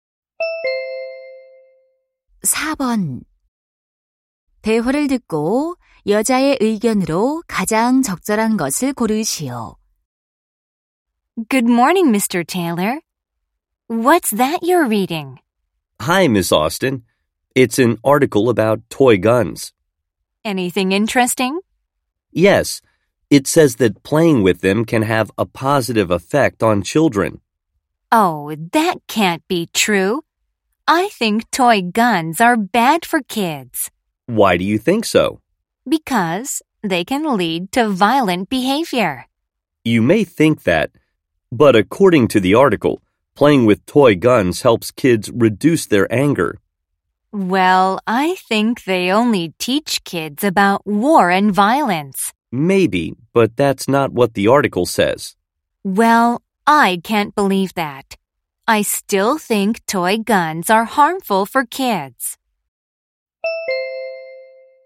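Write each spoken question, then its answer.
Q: 대화를 듣고 여자의 의견으로 가장 적절한 것을 고르시오.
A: 장난감 총은 아이들에게 해롭다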